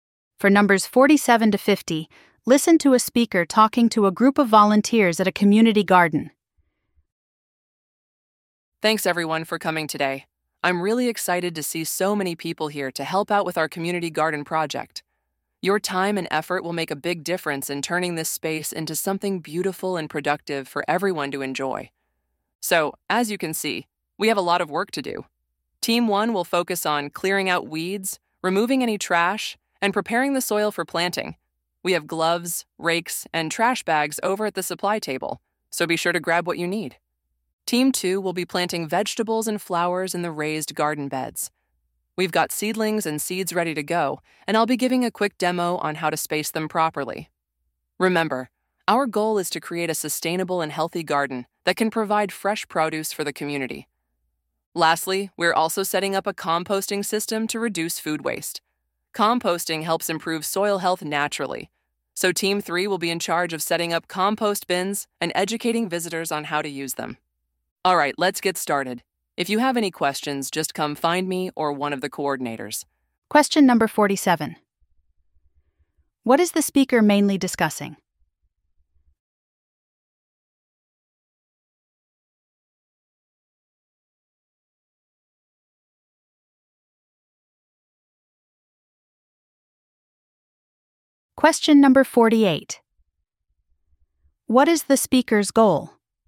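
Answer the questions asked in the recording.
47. Volunteer team tasks for the community garden
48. To create a sustainable garden providing fresh produce for the community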